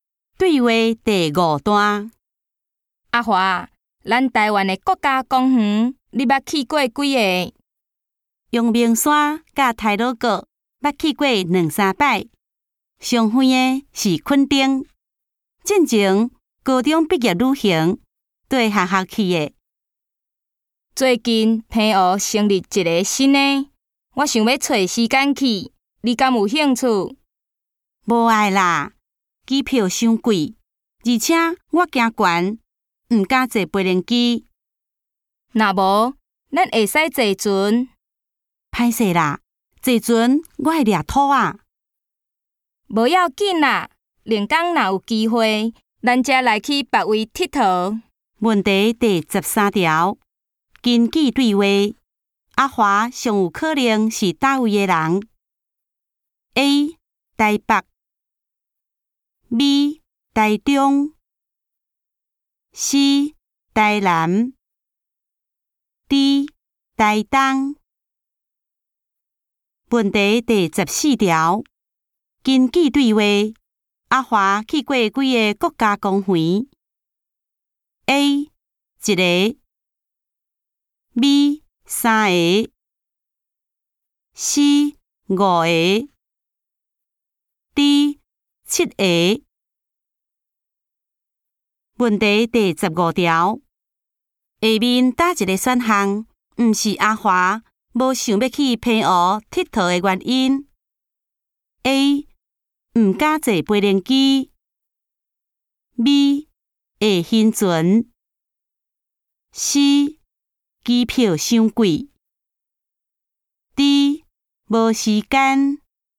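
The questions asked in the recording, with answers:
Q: 根据对话,阿华去过几个国家公园 ?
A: B: 三个

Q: 下面哪一个选项不是阿华无想要去平湖佚佗的原因 ?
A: D: 无时间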